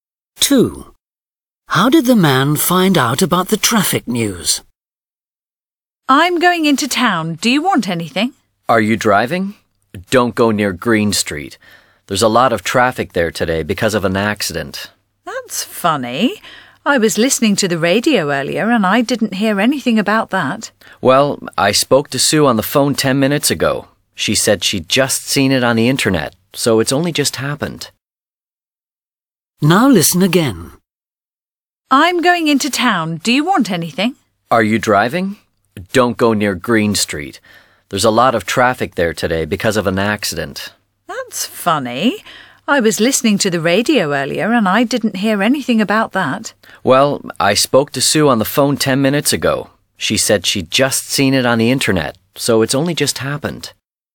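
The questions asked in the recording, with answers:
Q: How did the man find out about the traffic news?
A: from Sue on the phone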